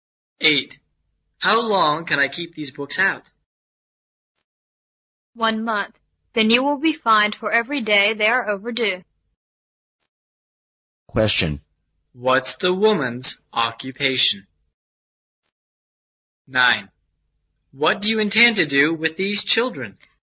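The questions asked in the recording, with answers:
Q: What's the woman's occupation?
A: A librarian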